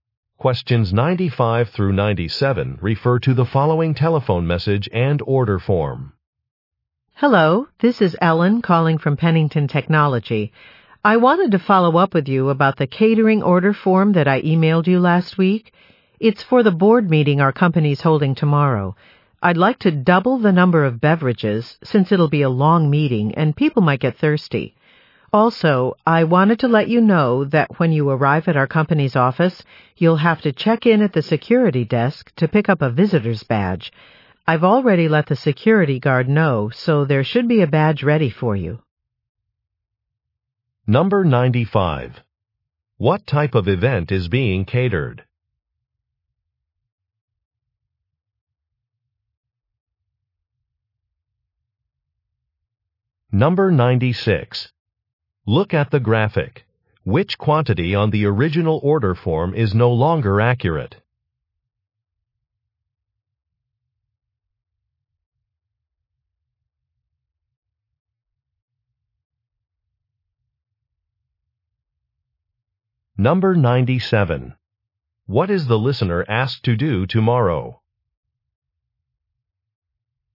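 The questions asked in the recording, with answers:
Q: What type of event is being catered?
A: A board meeting

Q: What is the listener asked to do tomorrow?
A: Check in at the security desk for a visitor's badge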